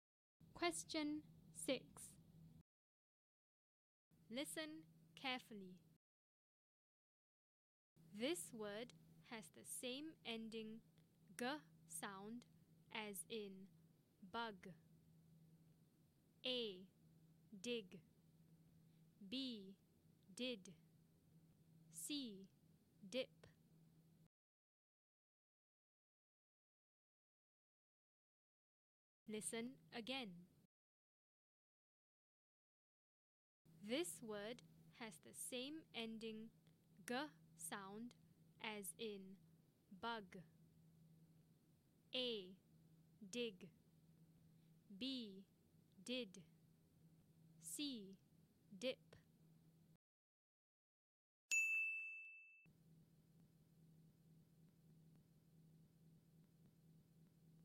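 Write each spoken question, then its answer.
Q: This word has the same ending g sound as in bug.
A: A: Dig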